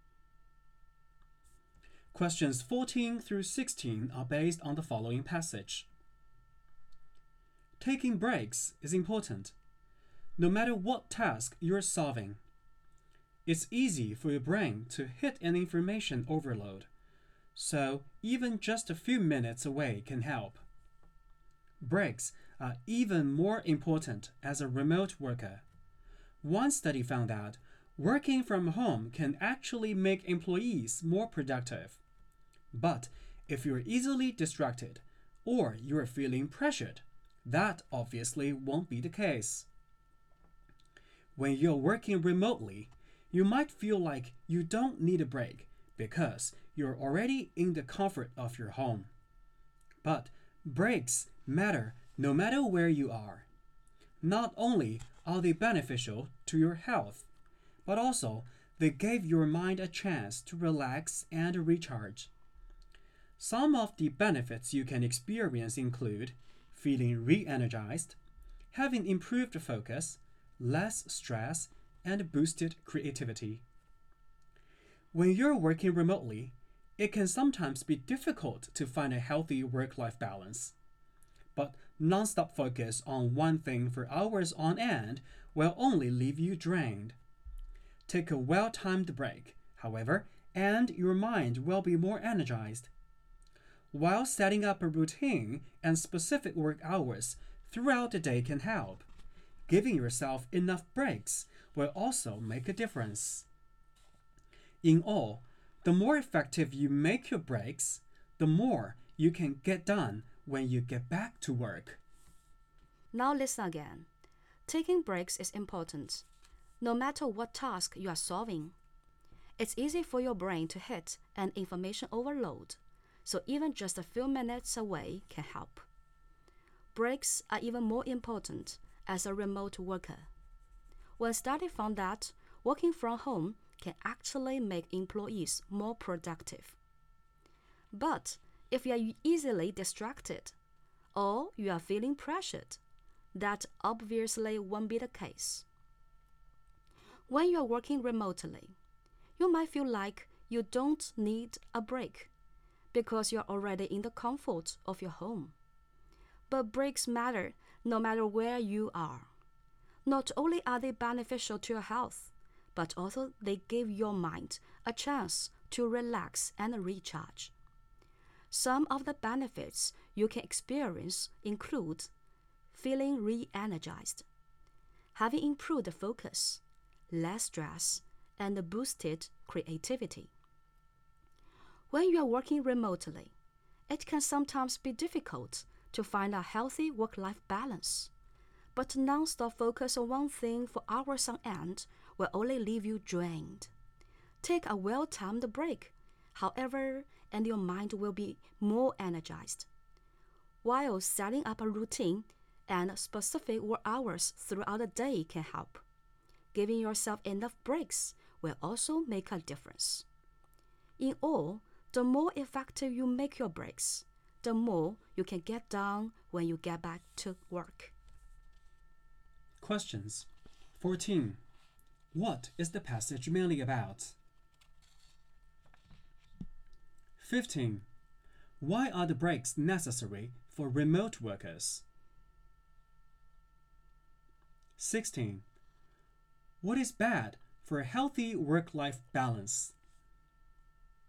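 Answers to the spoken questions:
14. The importance of taking breaks, especially for remote workers
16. Non-stop focus on one thing for hours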